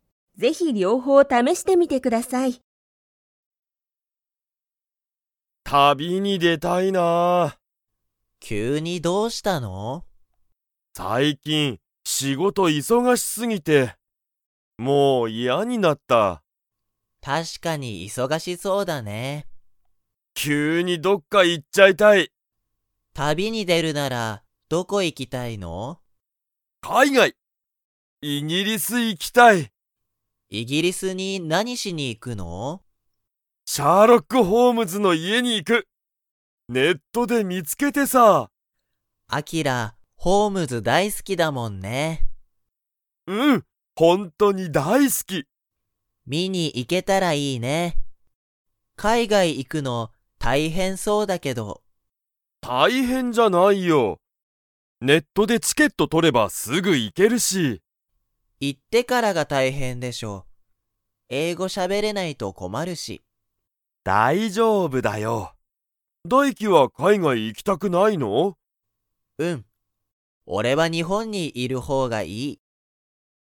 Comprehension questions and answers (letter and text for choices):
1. あきらはシャーロックホームズの家いえを で見みつけた。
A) 街まち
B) 地元じもと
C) テレビ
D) ネット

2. だいきは海外かいがいに行いきたいですか?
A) はい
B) いいえ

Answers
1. D) ネット
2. B) いいえ

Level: Level 4